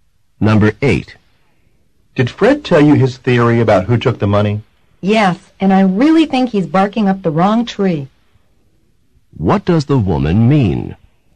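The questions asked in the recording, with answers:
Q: What does the woman mean?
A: She thinks Fred's theory is wrong.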